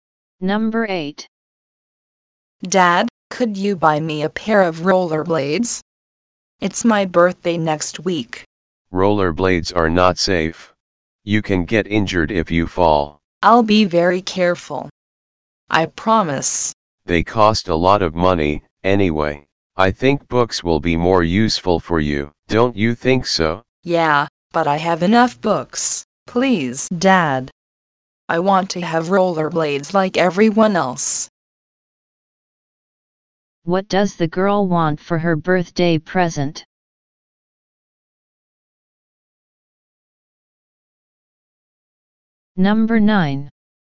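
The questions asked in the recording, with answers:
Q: What does the girl want for her birthday present?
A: Rollerblades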